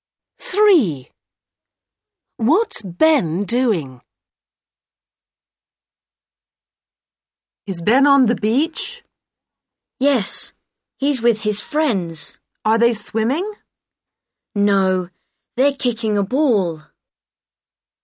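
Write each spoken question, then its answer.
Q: What's Ben doing?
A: Kicking a ball with his friends on the beach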